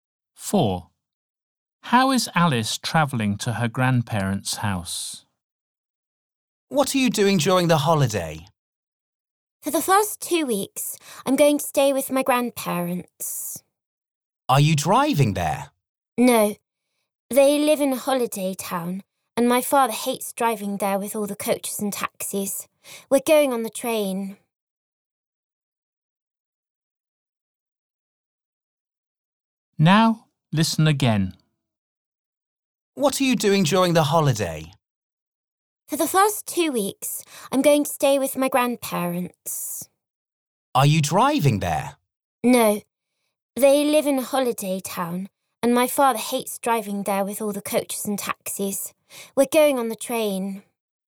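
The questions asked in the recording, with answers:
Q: How is Alice travelling to her grandparents' house?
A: By train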